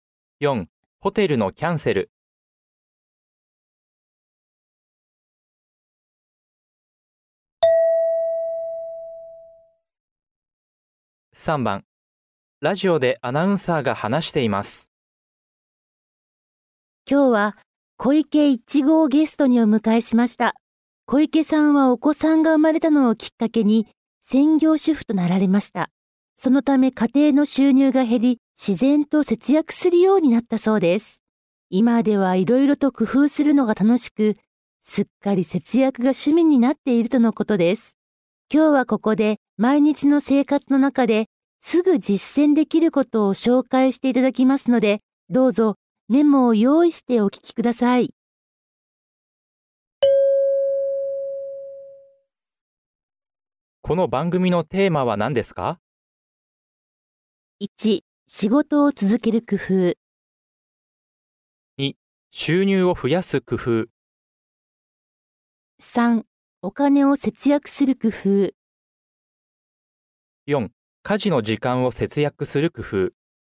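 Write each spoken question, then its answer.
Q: この番組のテーマは何ですか?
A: 3: お金を節約する工夫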